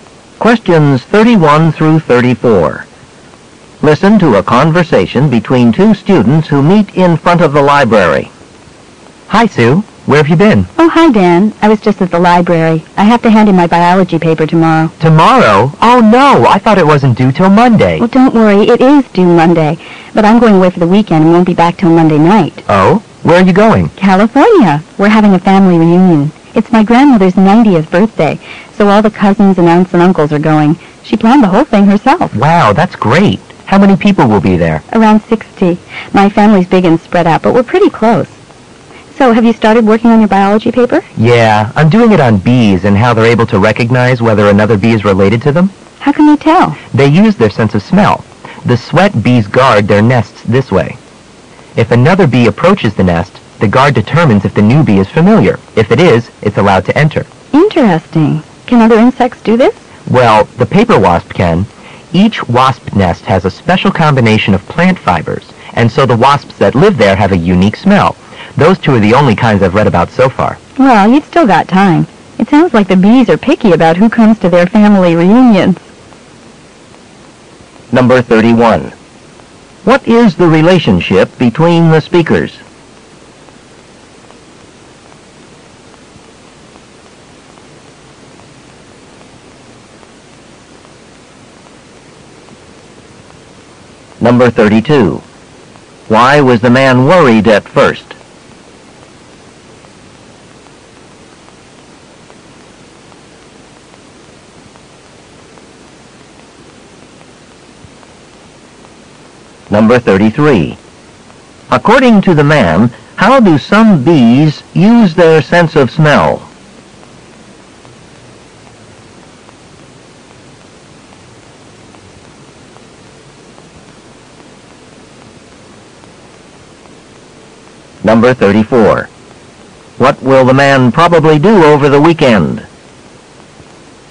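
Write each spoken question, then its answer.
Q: Why was the man worried at first?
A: He thought the paper was due tomorrow

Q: According to the man, how do some bees use their sense of smell?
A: To recognize related bees and guard their nest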